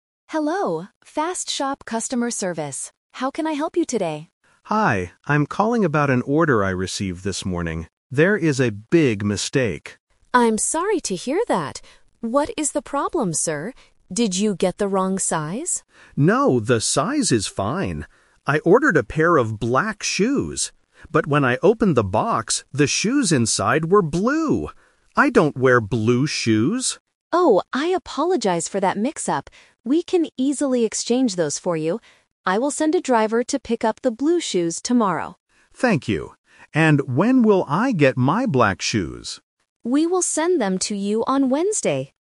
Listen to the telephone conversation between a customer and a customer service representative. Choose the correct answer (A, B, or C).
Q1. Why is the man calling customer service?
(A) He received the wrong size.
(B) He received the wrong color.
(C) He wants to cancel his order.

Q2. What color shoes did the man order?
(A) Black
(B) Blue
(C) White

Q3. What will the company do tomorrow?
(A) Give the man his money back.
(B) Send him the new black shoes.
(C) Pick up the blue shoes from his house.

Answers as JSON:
{"1": "B", "2": "A", "3": "C"}

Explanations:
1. David says he ordered black shoes but received blue ones. Option (A) is the trap; Nina asks if he got the wrong size, but David says, "No, the size is fine." Option (C) is a plausible reason to call, but he just wants an exchange, not a cancellation.
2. David clearly states, "I ordered a pair of black shoes." Option (B) is the trap; blue is the color he received by mistake, not the color he ordered. Option (C) is not mentioned in the audio.
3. This question tests careful listening of timelines. Nina says, "I will send a driver to pick up the blue shoes tomorrow." Option (B) is a trap; the company will send the new black shoes on Wednesday, not tomorrow. Option (A) is not mentioned.

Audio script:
Nina: Hello, FastShop Customer Service. How can I help you today?
David: Hi. I'm calling about an order I received this morning. There is a big mistake.
Nina: I'm sorry to hear that. What is the problem, sir? Did you get the wrong size?
David: No, the size is fine. I ordered a pair of black shoes. But when I opened the box, the shoes inside were blue! I don't wear blue shoes.
Nina: Oh, I apologize for that mix-up. We can easily exchange those for you. I will send a driver to pick up the blue shoes tomorrow.
David: Thank you. And when will I get my black shoes?

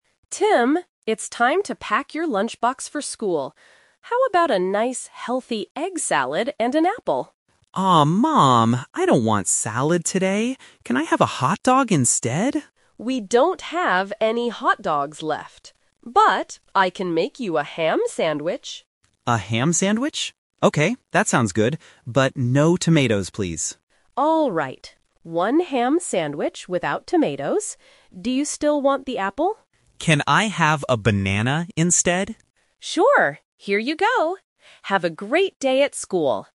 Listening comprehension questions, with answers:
Listen to the conversation between a mother and her son, and choose the correct answer (A, B, or C) for each question.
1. What is the boy going to have for his main lunch?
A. An egg salad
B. A hot dog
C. A ham sandwich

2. What does the boy want to leave out of his sandwich?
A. Tomatoes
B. Cheese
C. Ham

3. What fruit is the boy taking to school?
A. An apple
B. A banana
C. An orange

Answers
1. C
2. A
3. B

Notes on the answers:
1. The mother and son agree on a ham sandwich at the end. Option (A) is a trap; the mother suggests an egg salad first, but the boy refuses. Option (B) is also a trap; the boy wants a hot dog, but they don't have any left.
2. The boy accepts the sandwich but clearly says, "But no tomatoes, please." Option (C) is a trap because ham is the main ingredient he wants. Option (B) is a plausible sandwich ingredient, but it is never mentioned.
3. The boy asks his mother, "Can I have a banana instead?" and she agrees. Option (A) is a trap; the mother originally suggests an apple, but the boy changes it. Option (C) is not mentioned in the audio.

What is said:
Mother: Tim, it's time to pack your lunchbox for school. How about a nice, healthy egg salad and an apple?
Son: Aw, Mom! I don't want salad today. Can I have a hot dog instead?
Mother: We don't have any hot dogs left. But I can make you a ham sandwich.
Son: A ham sandwich? Okay, that sounds good. But no tomatoes, please.
Mother: Alright. One ham sandwich without tomatoes. Do you still want the apple?
Mother: Sure. Here you go. Have a great day at school!

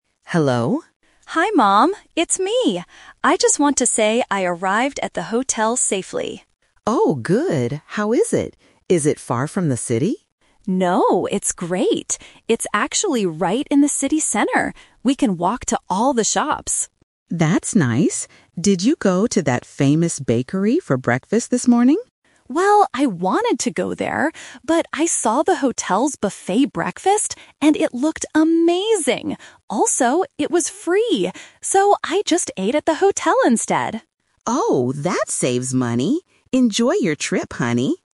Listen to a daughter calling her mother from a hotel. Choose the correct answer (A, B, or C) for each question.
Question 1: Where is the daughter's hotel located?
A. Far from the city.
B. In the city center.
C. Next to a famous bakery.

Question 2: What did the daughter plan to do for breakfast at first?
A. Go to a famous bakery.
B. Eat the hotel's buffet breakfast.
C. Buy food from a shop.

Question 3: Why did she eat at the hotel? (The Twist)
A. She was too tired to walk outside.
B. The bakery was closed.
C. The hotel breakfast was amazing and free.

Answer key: 1B, 2A, 3C

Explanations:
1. The daughter clearly states, "It's actually right in the city center."
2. When the mother asks about the famous bakery, the daughter says, "Well, I wanted to go there." This shows her initial plan.
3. This is the Twist. She changed her plan from the bakery to the hotel because "it looked amazing. Also, it was free!"

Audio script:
Mom: Hello?
Daughter: Hi Mom, it's me! I just want to say I arrived at the hotel safely.
Mom: Oh, good. How is it? Is it far from the city?
Daughter: No, it's great! It's actually right in the city center. We can walk to all the shops.
Mom: That's nice. Did you go to that famous bakery for breakfast this morning?
Daughter: Well, I wanted to go there. But I saw the hotel's buffet breakfast, and it looked amazing. Also, it was free! So, I just ate at the hotel instead.

